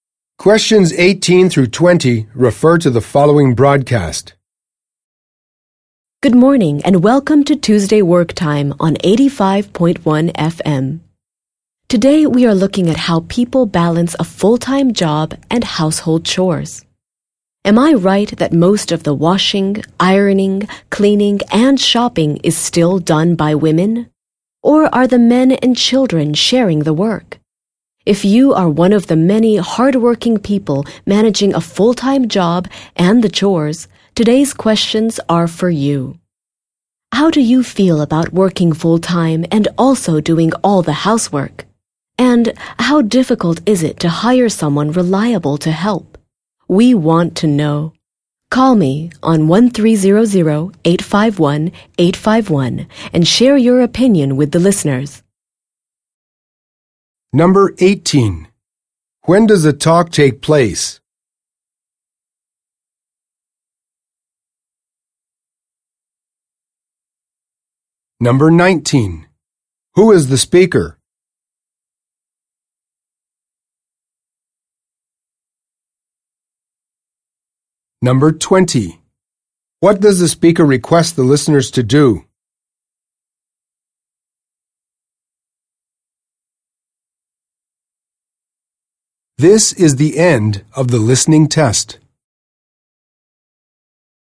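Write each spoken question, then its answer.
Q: When does the talk take place?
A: Tuesday morning

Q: Who is the speaker?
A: A radio host

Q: What does the speaker request the listeners to do?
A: Call in and share their opinions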